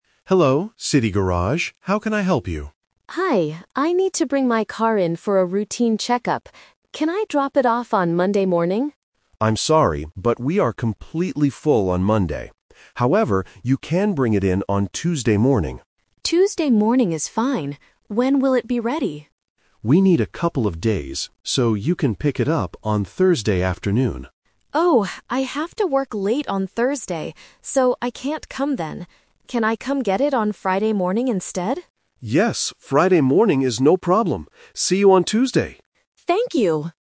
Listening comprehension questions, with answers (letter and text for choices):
Listen to the conversation and choose the correct answer (A, B, or C).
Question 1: When will the customer bring her car to the garage?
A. Monday morning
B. Tuesday morning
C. Thursday afternoon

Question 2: When will the customer pick up her car?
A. Tuesday morning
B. Thursday afternoon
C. Friday morning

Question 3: Why can't the customer get her car on Thursday?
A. The car is not ready yet.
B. The garage is closed.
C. She has to work late.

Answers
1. B. Tuesday morning
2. C. Friday morning
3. C. She has to work late.

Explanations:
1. The customer agrees to bring the car in on Tuesday morning. Option (A) is a trap because Monday is her first choice, but the garage is full. Option (C) is a trap because Thursday is when the car will be ready, not when she brings it in.
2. They finally agree that she will pick up the car on Friday morning. Option (B) is a trap because the manager suggests Thursday afternoon, but she is busy. Option (A) is a trap because Tuesday is the drop-off day.
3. The customer says, "I have to work late on Thursday, so I can't come then." Option (A) is a trap because the manager explicitly states the car will be ready on Thursday. Option (B) is plausible but is never mentioned in the audio.

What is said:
Manager: Hello, City Garage. How can I help you?
Customer: Hi, I need to bring my car in for a routine check-up. Can I drop it off on Monday morning?
Manager: I'm sorry, but we are completely full on Monday. However, you can bring it in on Tuesday morning.
Customer: Tuesday morning is fine. When will it be ready?
Manager: We need a couple of days, so you can pick it up on Thursday afternoon.
Customer: Oh, I have to work late on Thursday, so I can't come then. Can I come get it on Friday morning instead?

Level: A2